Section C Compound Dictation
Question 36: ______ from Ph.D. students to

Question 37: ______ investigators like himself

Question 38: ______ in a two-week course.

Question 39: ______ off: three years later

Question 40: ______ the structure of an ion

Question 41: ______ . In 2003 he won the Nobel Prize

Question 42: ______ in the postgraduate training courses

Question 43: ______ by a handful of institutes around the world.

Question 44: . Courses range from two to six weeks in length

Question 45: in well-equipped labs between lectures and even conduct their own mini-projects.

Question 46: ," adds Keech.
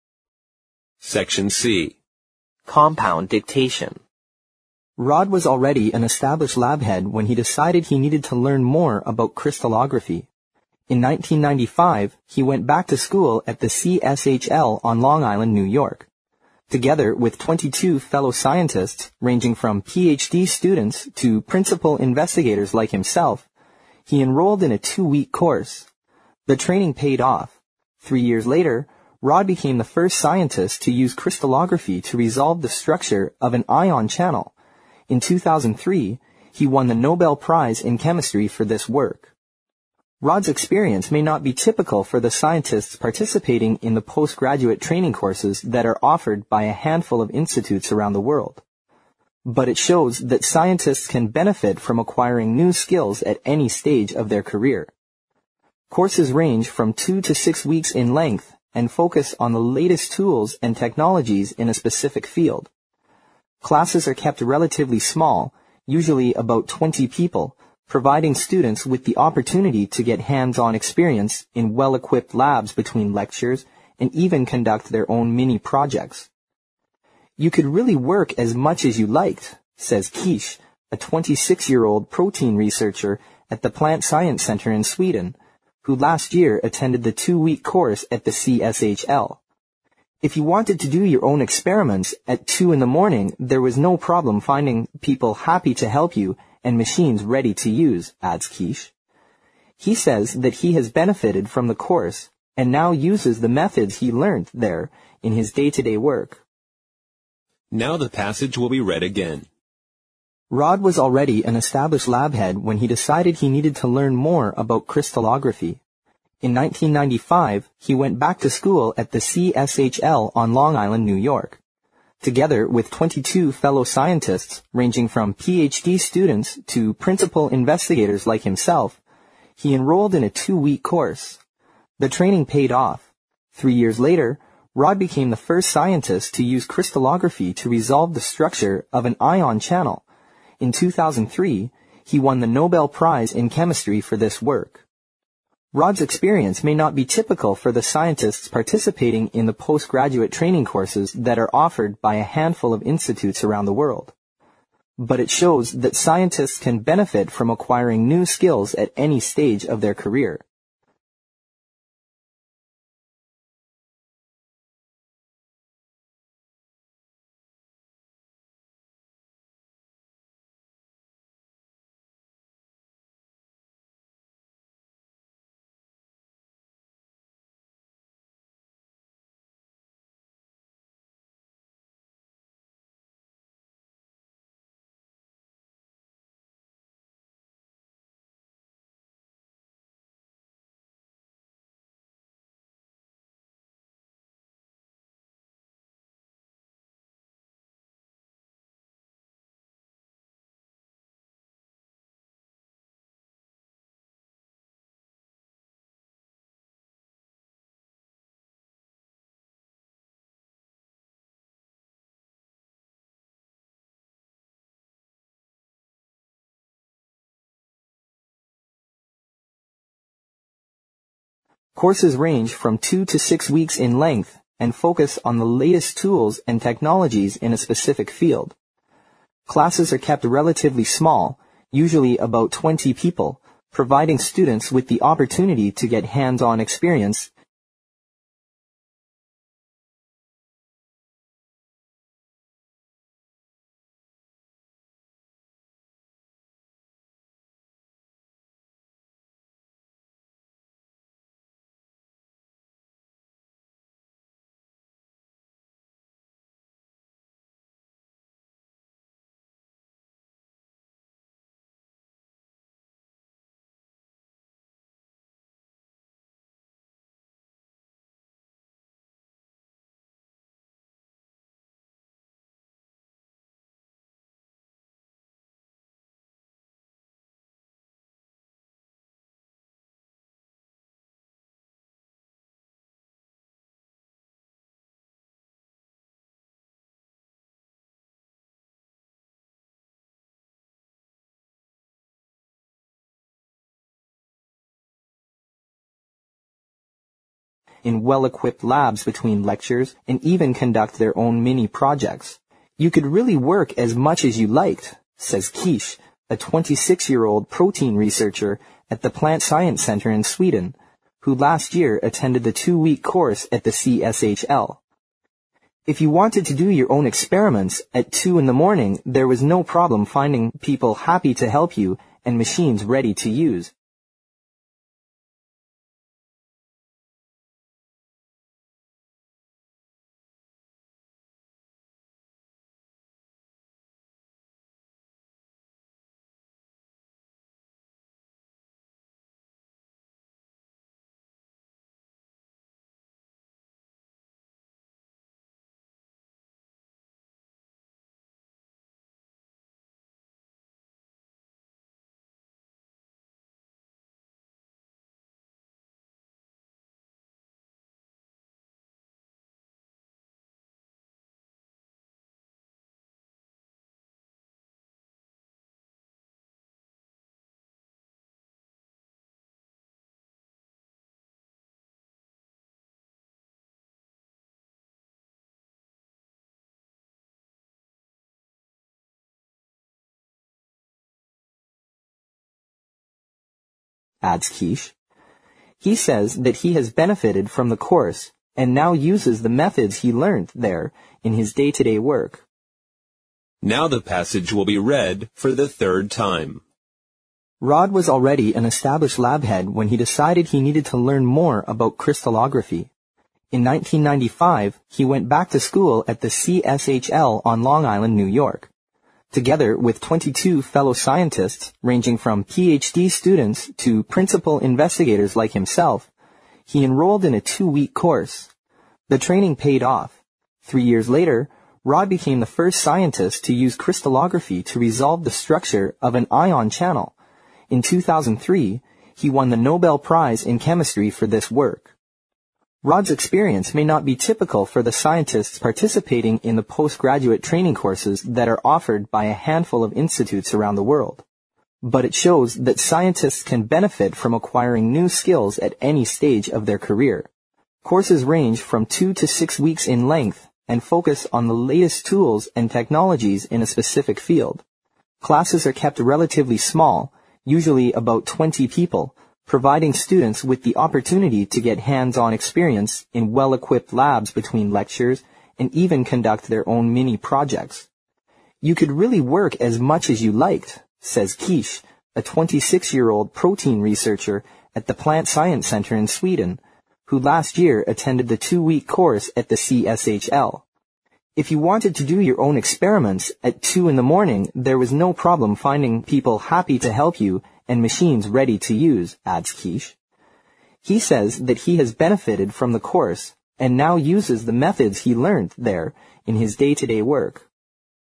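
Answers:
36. ranging
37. principal
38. enrolled
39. paid
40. resolve
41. channel
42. participating
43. offered
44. But it shows that scientists can benefit from acquiring new skills at any stage of their career
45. Classes are kept relatively small, usually about 20 people, providing students with the opportunity to get hands-on experience
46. If you wanted to do your own experiments at 2 in the morning, there was no problem finding people happy to help you and machines ready to use

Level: 四级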